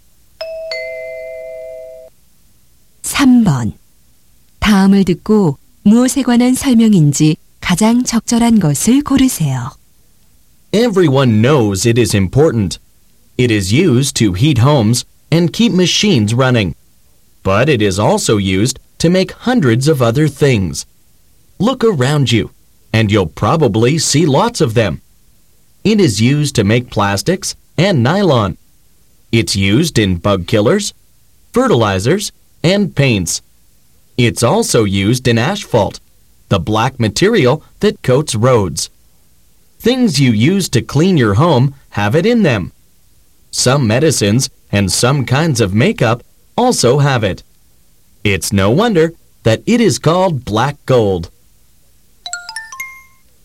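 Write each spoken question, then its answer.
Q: 다음을 듣고 무엇에 관한 설명인지 가장 적절한 것을 고르세요.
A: 석유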